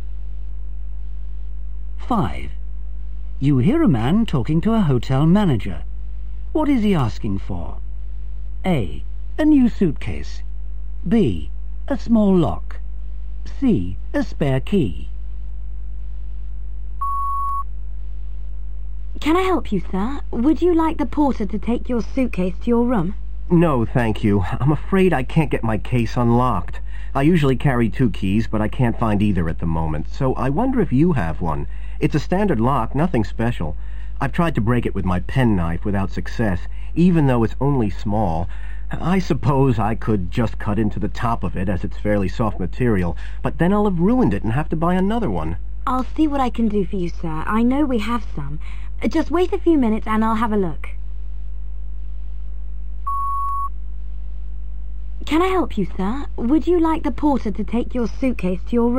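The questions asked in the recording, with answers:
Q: What is he asking for?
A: C: A spare key.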